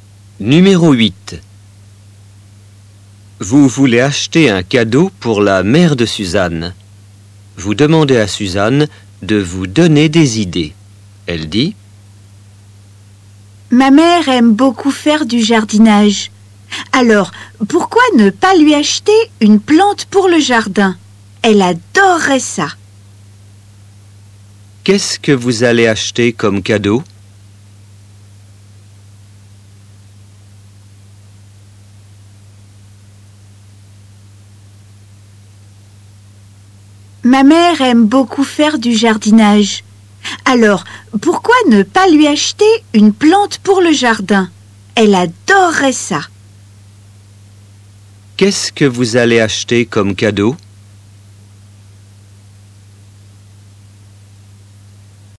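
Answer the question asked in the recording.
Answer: une plante pour le jardin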